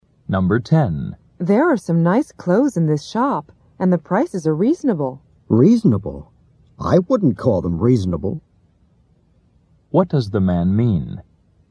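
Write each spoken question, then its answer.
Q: What does the man mean?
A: The prices are not reasonable.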